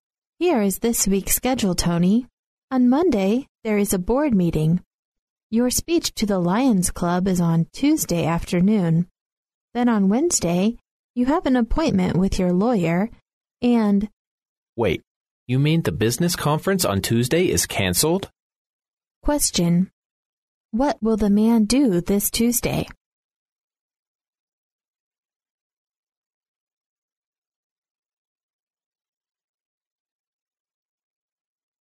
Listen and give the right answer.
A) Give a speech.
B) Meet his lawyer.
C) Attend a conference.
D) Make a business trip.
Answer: A) Give a speech.

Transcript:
A
[听力原文] W: Here is this week's schedule, Tony. On Monday, there is the board meeting. Your speech to the lion's club is on Tuesday afternoon. Then on Wednesday you have an appointment with your lawyer and... M: Wait, you mean the business conference on Tuesday is cancelled? Q: What will the man do this Tuesday?